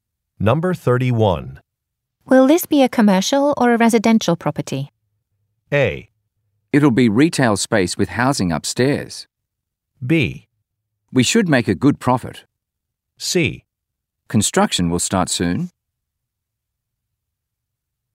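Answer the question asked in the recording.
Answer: A: It'll be retail space with housing upstairs.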